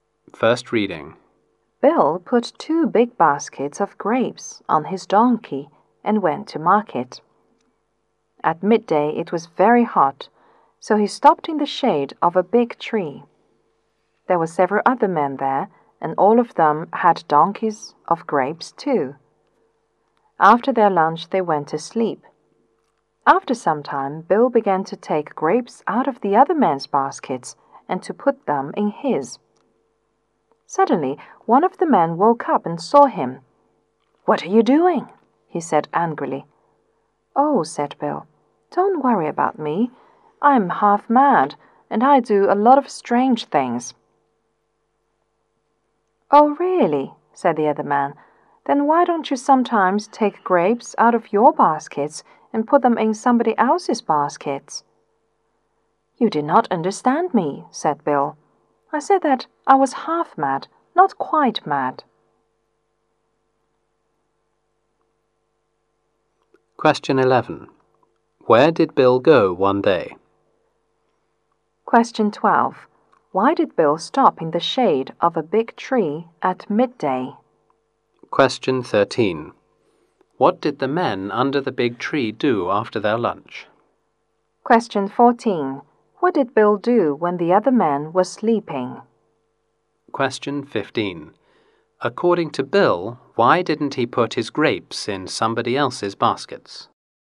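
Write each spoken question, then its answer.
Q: Question 11. Where did Bill go one day?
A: To market

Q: Question 12. Why did Bill stop in the shade of a big tree at midday?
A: It was very hot

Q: Question 13. What did the men under the big tree do after their lunch?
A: They went to sleep

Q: Question 14. What did Bill do when the other men were sleeping?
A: He took grapes out of their baskets and put them in his

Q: Question 15. According to Bill, why didn't he put his grapes in somebody else's baskets?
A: He was only half mad, not quite mad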